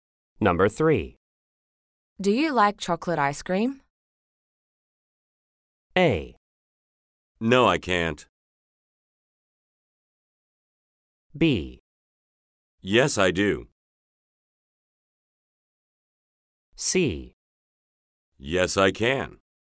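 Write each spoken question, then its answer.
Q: Do you like chocolate ice cream?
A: B: Yes, I do.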